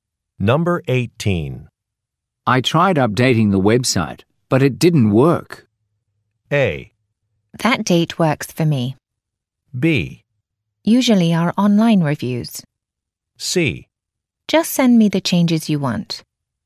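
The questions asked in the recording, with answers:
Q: I tried updating the website, but it didn't work.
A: C: Just send me the changes you want.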